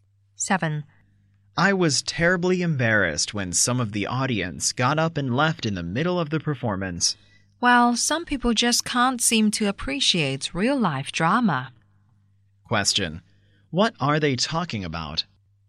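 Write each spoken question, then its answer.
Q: What are they talking about?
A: A play (a drama performance)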